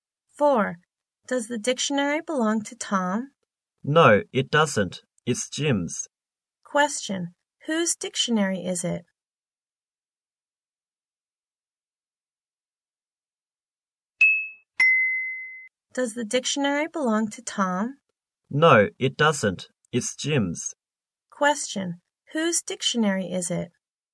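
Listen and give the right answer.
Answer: Jim's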